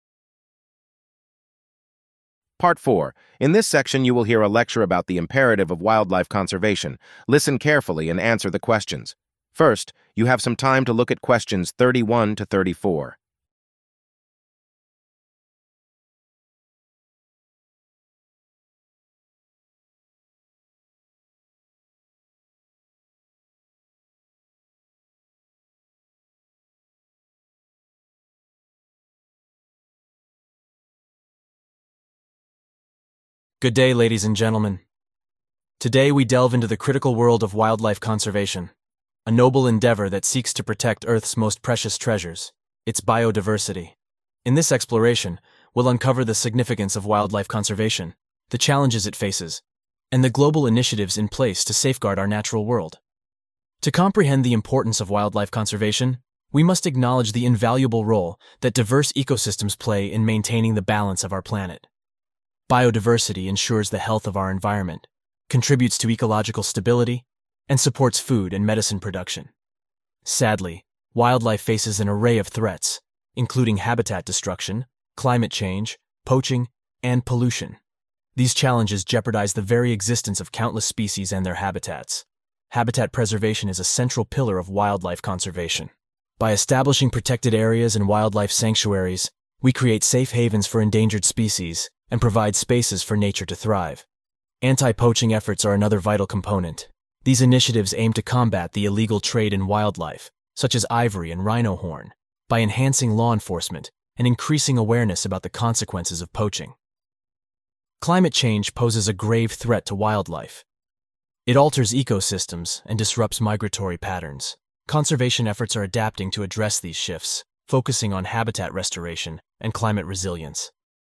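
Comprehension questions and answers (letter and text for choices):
Match the numbers (31-34) to the letters (A-D) to correctly associate each concept with its respective aspect of wildlife conservation.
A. Importance of biodiversity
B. Role of habitat preservation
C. Significance of anti-poaching efforts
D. Impact of climate change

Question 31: Creating safe havens for endangered species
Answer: B. Role of habitat preservation

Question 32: Combating the illegal trade in wildlife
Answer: C. Significance of anti-poaching efforts

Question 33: Alters ecosystems and disrupts migratory patterns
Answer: D. Impact of climate change

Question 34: Ensures the health of the environment, contributes to ecological stability, and supports food and medicine production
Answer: A. Importance of biodiversity

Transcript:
Good day, ladies and gentlemen. Today, we delve into the critical world of wildlife conservation, a noble endeavor that seeks to protect Earth's most precious treasures – its biodiversity. 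In this exploration, we'll uncover the significance of wildlife conservation, the challenges it faces, and the global initiatives in place to safeguard our natural world.
To comprehend the importance of wildlife conservation, we must acknowledge the invaluable role that diverse ecosystems play in maintaining the balance of our planet. Biodiversity ensures the health of our environment, contributes to ecological stability, and supports food and medicine production.
Sadly, wildlife faces an array of threats, including habitat destruction, climate change, poaching, and pollution. These challenges jeopardize the very existence of countless species and their habitats.
Habitat preservation is a central pillar of wildlife conservation. By establishing protected areas and wildlife sanctuaries, we create safe havens for endangered species and provide spaces for nature to thrive.
Anti-poaching efforts are another vital component. 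These initiatives aim to combat the illegal trade in wildlife, such as ivory and rhino horn, by enhancing law enforcement and increasing awareness about the consequences of poaching.
Climate change poses a grave threat to wildlife. It alters ecosystems and disrupts migratory patterns. Conservation efforts are adapting to address these shifts, focusing on habitat restoration and climate resilience.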